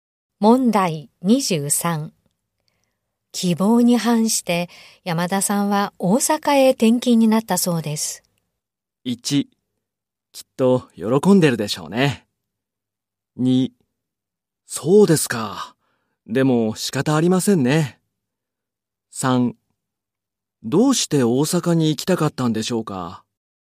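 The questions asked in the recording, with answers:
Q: 希望に反して、山田さんは大阪へ転勤になったそうです。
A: 2: そうですか。でも仕方ありませんね。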